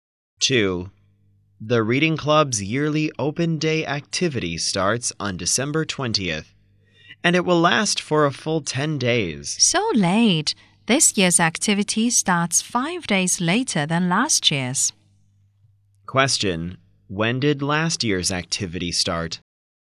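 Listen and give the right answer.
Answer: On December 15th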